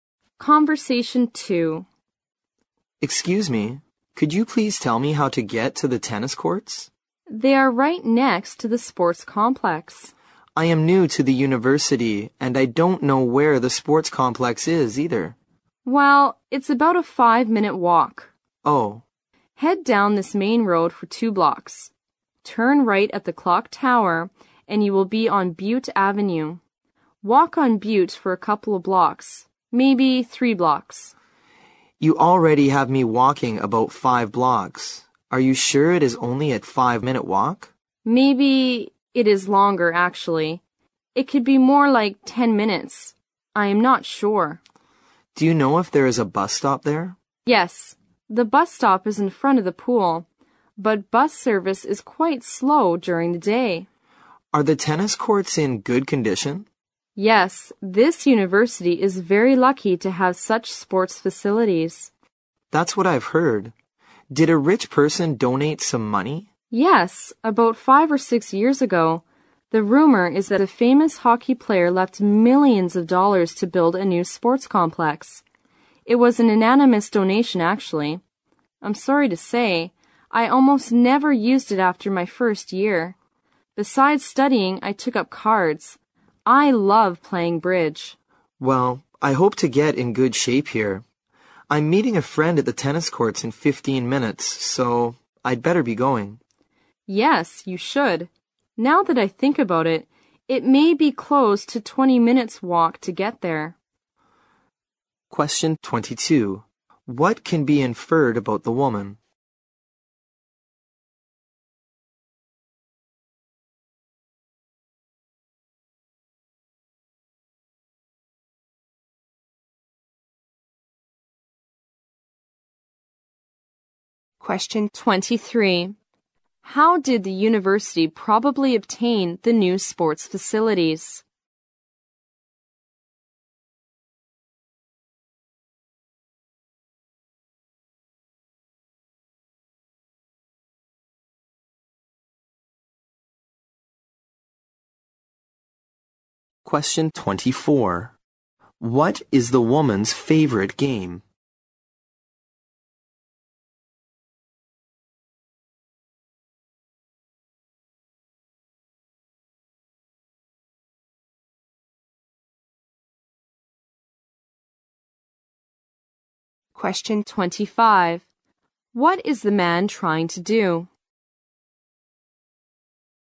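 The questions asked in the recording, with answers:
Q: How did the university probably obtain the new sports facilities?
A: Through an anonymous donation

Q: What is the woman's favorite game?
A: Bridge

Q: What is the man trying to do?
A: Find his way to the tennis courts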